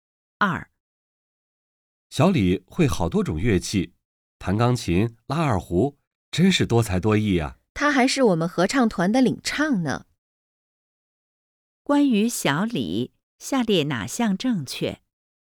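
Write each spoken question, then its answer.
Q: 关于小李,下列哪项正确?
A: 小李多才多艺,会弹钢琴、拉二胡,还是合唱团的领唱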